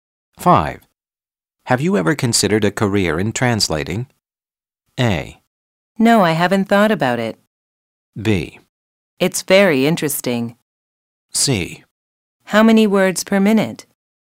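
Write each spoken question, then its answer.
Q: Have you ever considered a career in translating?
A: A: No, I haven't thought about it.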